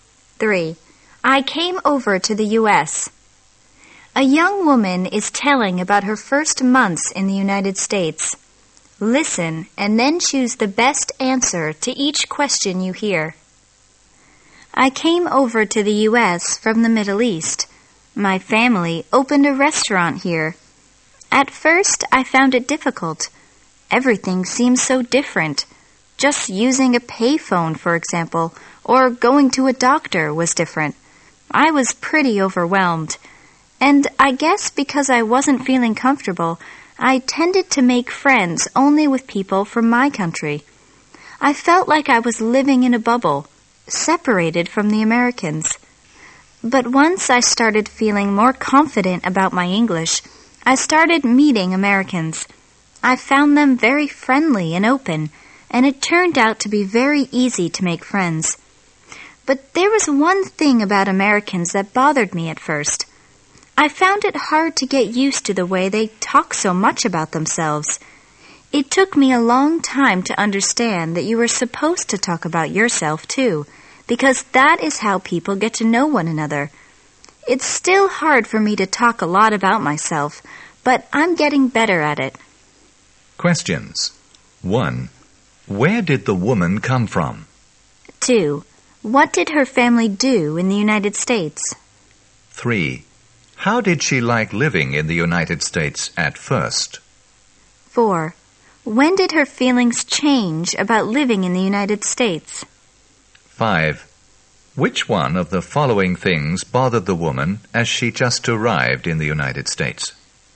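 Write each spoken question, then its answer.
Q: Where did the woman come from?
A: The Middle East

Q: What did her family do in the United States?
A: Opened a restaurant

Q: How did she like living in the United States at first?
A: She found it difficult and was overwhelmed

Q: When did her feelings change about living in the United States?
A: When she started feeling more confident about her English

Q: Which one of the following things bothered the woman as she just arrived in the United States?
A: Americans talk so much about themselves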